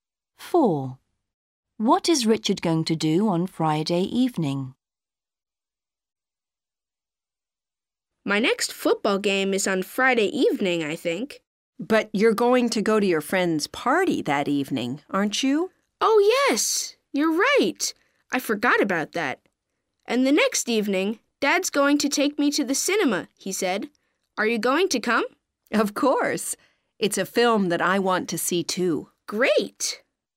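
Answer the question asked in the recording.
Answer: go to his friend's party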